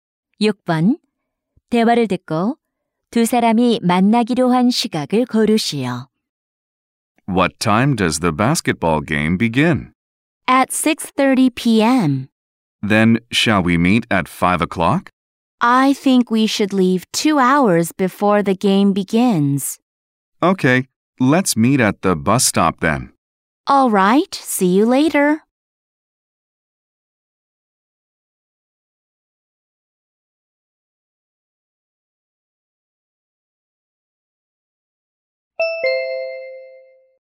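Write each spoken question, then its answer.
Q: 대화를 듣고 두 사람이 만나기로 한 시각을 고르시오.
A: 오후 4시 30분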